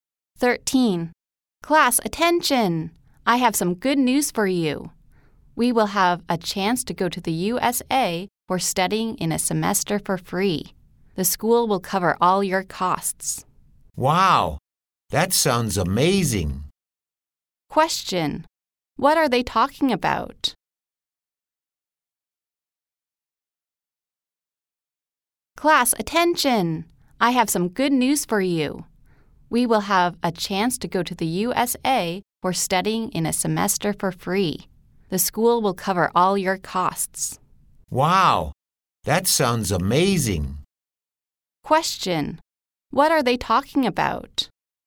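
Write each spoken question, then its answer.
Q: What are they talking about?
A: A free chance to study in the USA for a semester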